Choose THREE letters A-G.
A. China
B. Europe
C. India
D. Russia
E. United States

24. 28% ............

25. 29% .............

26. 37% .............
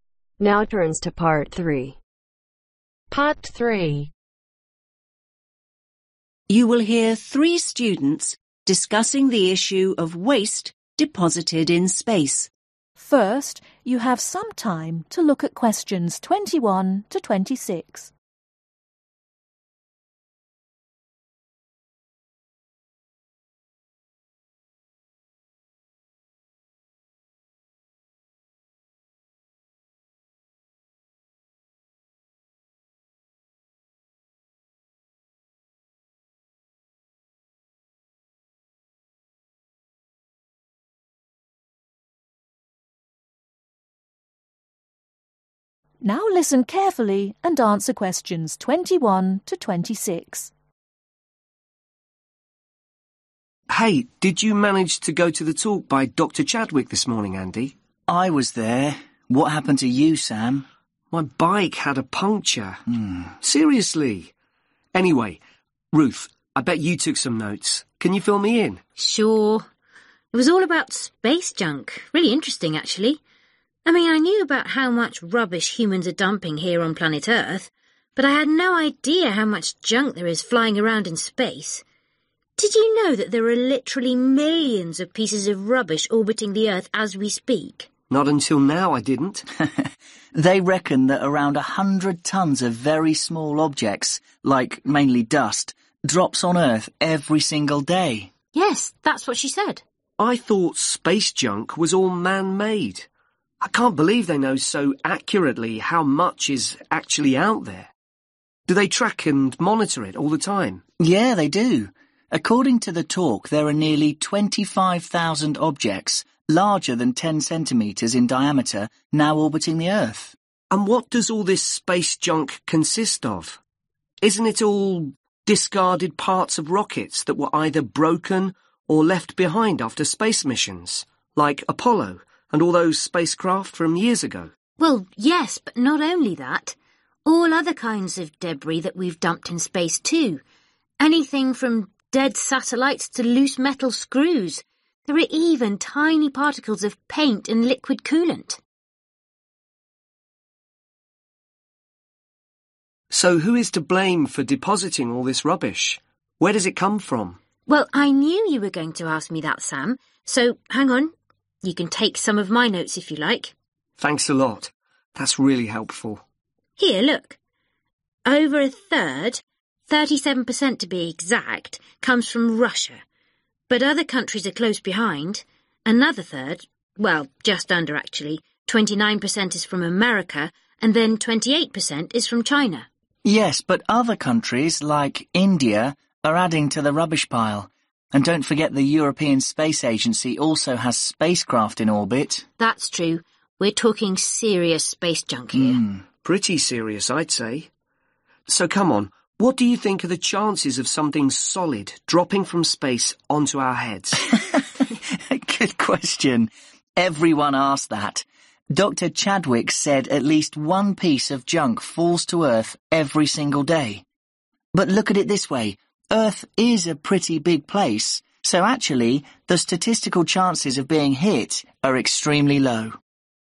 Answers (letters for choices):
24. A
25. E
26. D